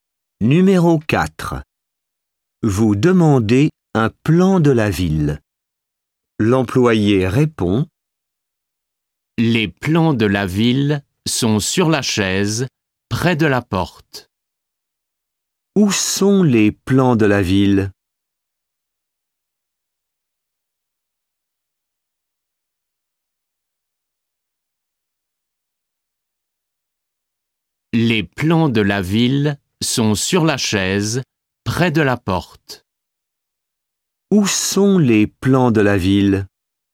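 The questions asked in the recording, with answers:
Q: Où sont les plans de la ville?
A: Sur la chaise, près de la porte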